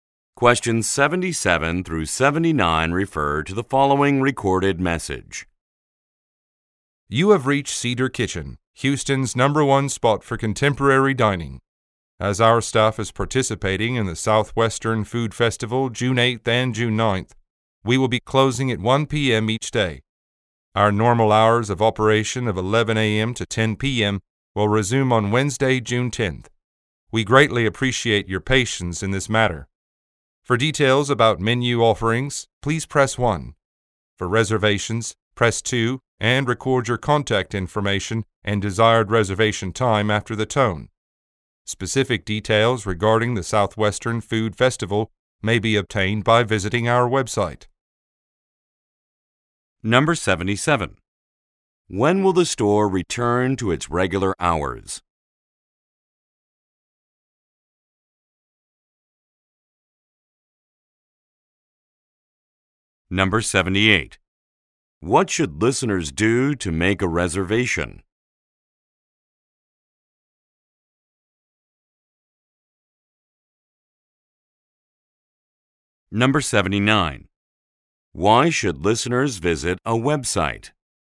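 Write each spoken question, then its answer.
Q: When will the store return to its regular hours?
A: Wednesday, June 10th

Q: What should listeners do to make a reservation?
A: Press 2 and record contact information and desired time

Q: Why should listeners visit a website?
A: To get details about the Southwestern Food Festival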